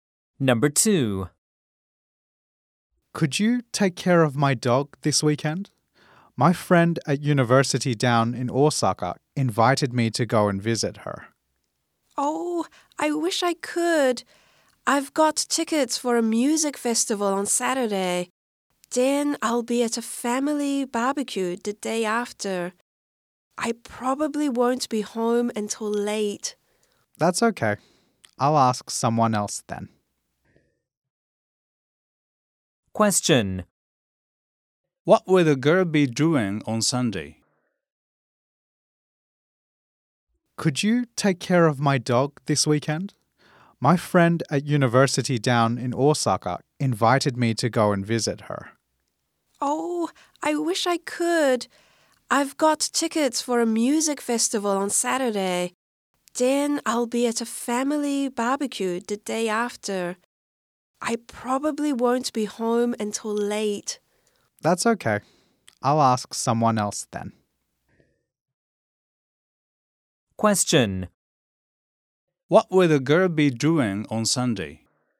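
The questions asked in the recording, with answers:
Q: What will the girl be doing on Sunday?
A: Going to a family barbecue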